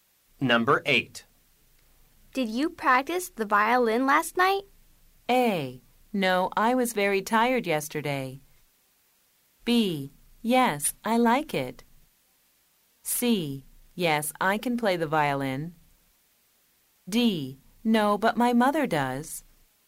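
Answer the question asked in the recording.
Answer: A: No, I was very tired yesterday.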